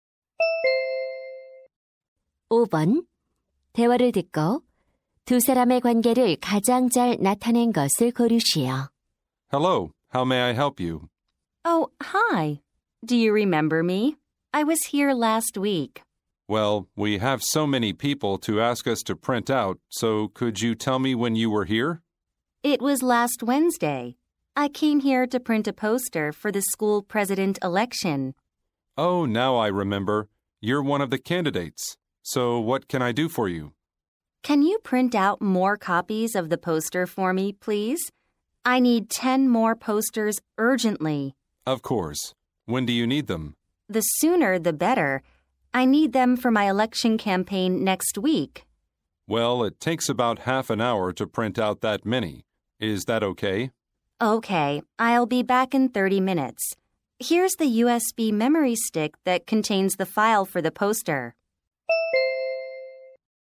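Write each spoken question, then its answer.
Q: 대화를 듣고 두 사람의 관계를 가장 잘 나타낸 것을 고르시오.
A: 인쇄소 직원 - 학생회장 후보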